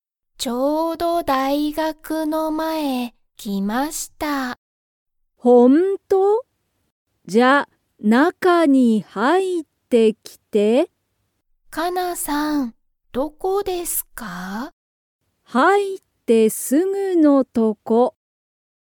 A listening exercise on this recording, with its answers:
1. カナは、大学(だいがく)の前(まえ)にいますか?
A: いいえ

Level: Level 1